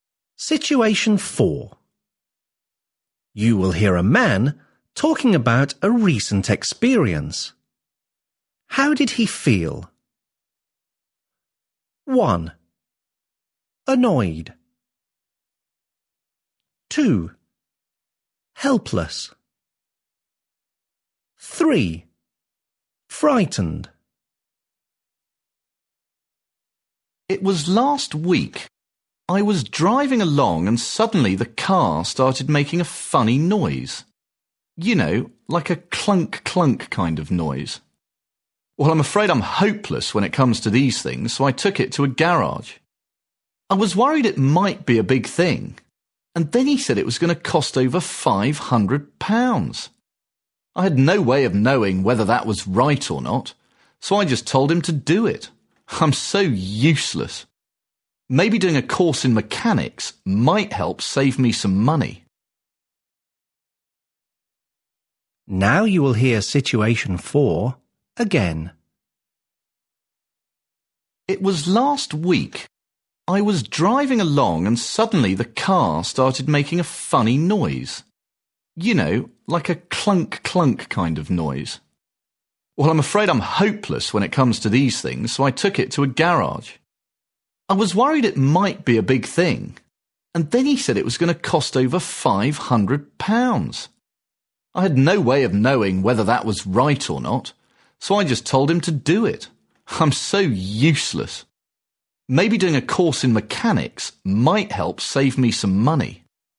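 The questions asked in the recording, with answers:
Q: How did he feel?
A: 2: Helpless.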